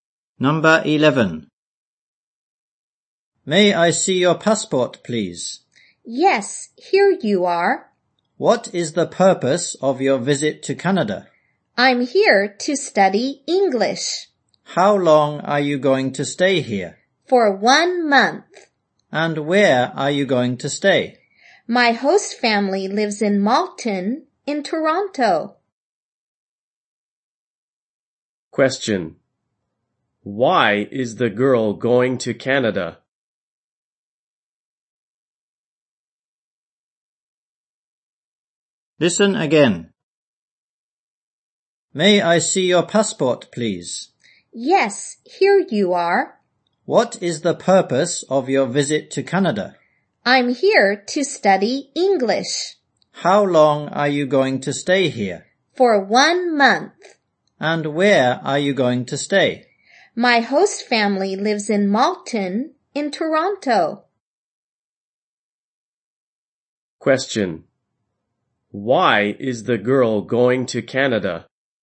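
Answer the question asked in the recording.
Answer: To study English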